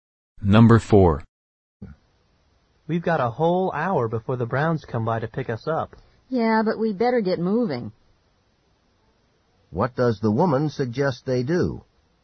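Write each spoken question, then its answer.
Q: What does the woman suggest they do?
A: Start getting ready now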